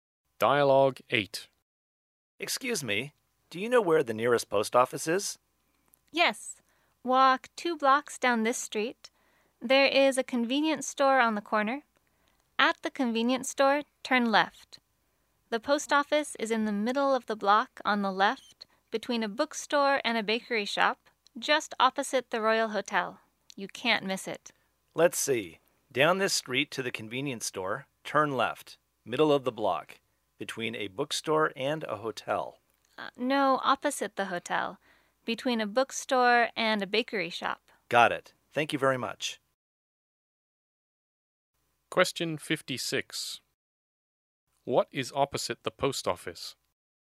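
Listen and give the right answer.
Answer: The Royal Hotel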